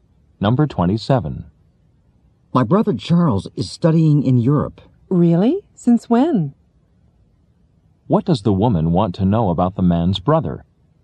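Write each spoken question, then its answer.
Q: What does the woman want to know about the man's brother?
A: How long he has been studying in Europe.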